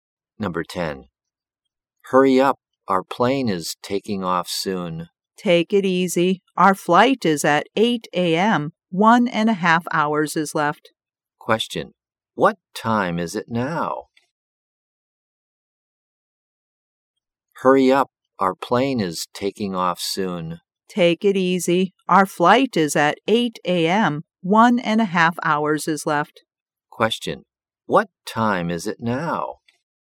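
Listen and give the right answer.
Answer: 6:30 a.m.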